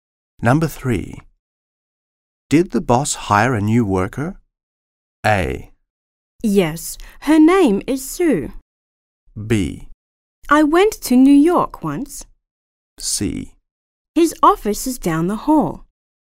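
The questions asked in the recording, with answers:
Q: Did the boss hire a new worker?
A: A: Yes. Her name is Sue.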